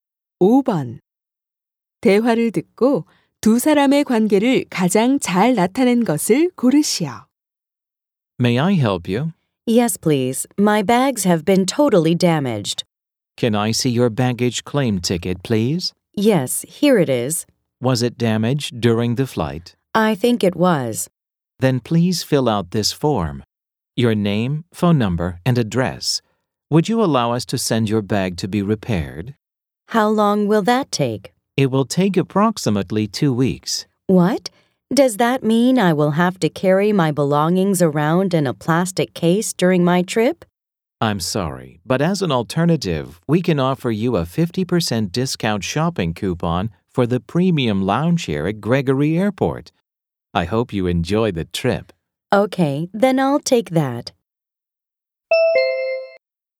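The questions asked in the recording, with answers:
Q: 대화를 듣고 두 사람의 관계를 가장 잘 나타낸 것을 고르시오.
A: 공항 직원 - 승객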